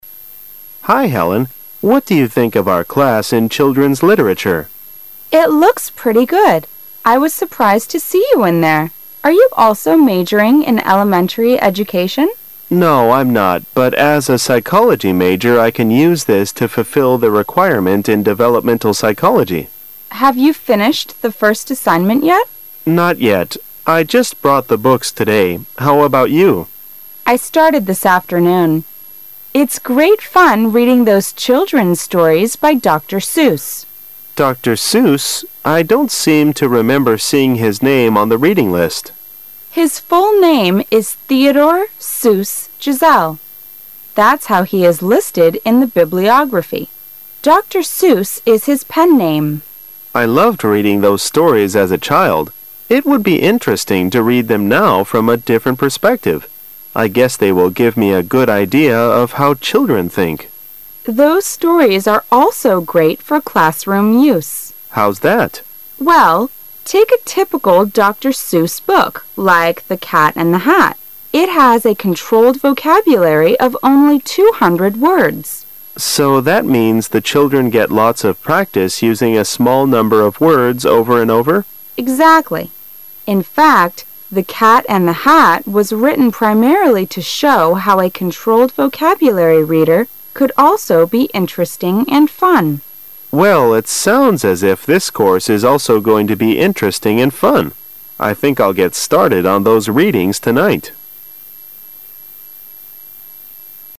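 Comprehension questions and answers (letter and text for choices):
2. Which of the following is true about Dr. Zuss?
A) He is a writer of children's stories.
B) He is a psychology professor.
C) He is Theodore Zuss Gisele's friend.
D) He is a character in the book The Cat and the Hat.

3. The book The Cat and the Hat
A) tells a boring story.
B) has a controlled vocabulary.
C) is a popular book.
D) is for both children and adults.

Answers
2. A) He is a writer of children's stories.
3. B) has a controlled vocabulary.

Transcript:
[解析] 11-13 M: Hi, Helen. What do you think of our class in children's literature? W: It looks pretty good. I was surprised to see you in there. Are you also majoring in elementary education? M: No, I'm not. But as a psychology major I can use this to fulfill the requirement in developmental psychology. W: Have you finished the first assignment yet? M: Not yet. I just brought the books today. 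How about you? W: I started this afternoon. It's great fun reading those children's stories by Dr. M: Dr. I don't seem to remember seeing his name on the reading list. W: His full name is Theodore Zuss Gisele. That's how he is listed in the bibliography Dr. Zuss is his pen name. M: I loved reading those stories as a child. It would be interesting to read them now from a different perspective. I guess they will give me a good idea of how children think. W: Those stories are also great for classroom use. M: How's that? W: Well, take a typical Dr. Zuss book like The Cat and the Hat. It has a controlled vocabulary of only 200 words. M: So that means the children get lots of practice using a small number of words over and over. W: Exactly. In fact, The Cat and the Hat was written primarily to show how a controlled vocabulary reader could also be interesting and fun. M: Well. It sounds as if this course is also going to be interesting and fun. 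I think I'll get started on those readings tonight.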